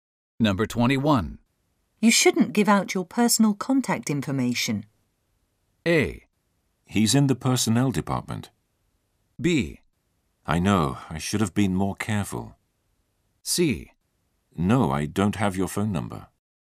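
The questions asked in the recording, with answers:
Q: You shouldn't give out your personal contact information.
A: B: I know. I should have been more careful.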